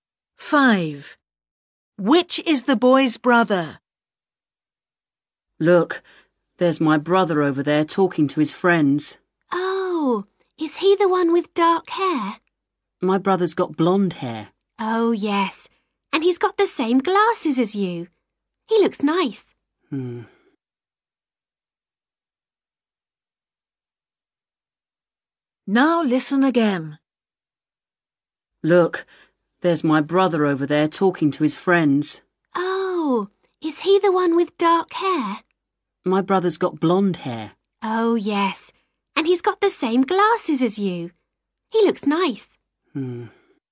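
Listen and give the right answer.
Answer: The one with blonde hair and glasses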